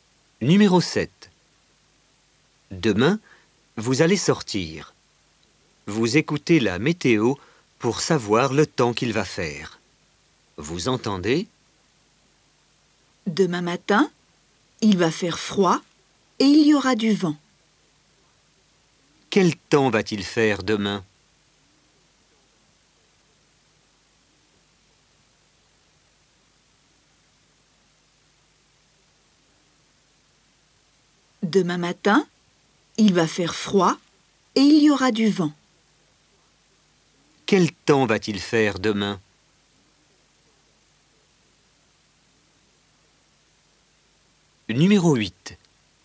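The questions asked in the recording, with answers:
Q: Quel temps va-t-il faire demain?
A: Il va faire froid et il y aura du vent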